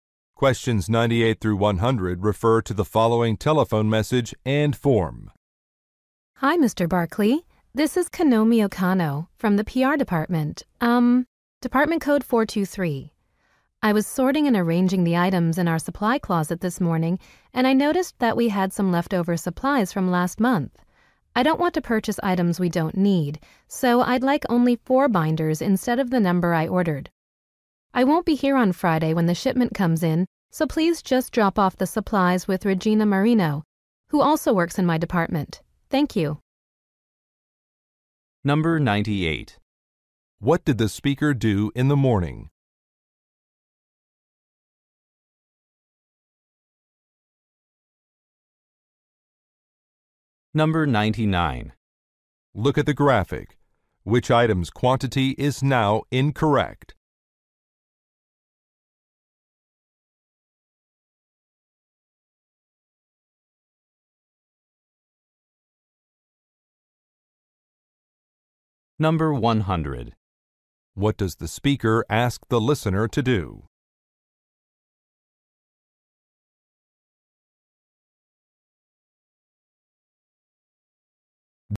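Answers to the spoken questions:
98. Organized the supply closet
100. Leave the supplies with Regina Marino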